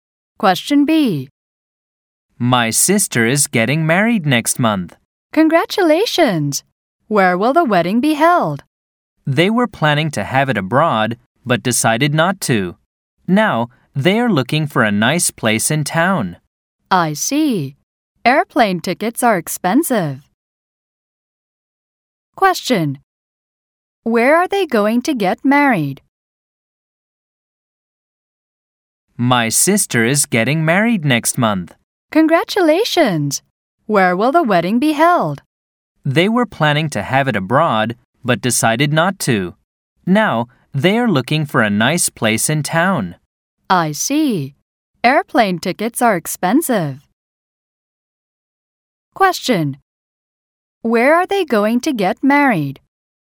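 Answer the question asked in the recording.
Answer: At a nice place in town.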